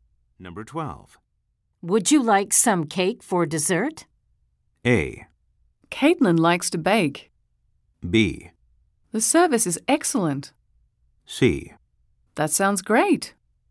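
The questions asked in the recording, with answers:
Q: Would you like some cake for dessert?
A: C: That sounds great.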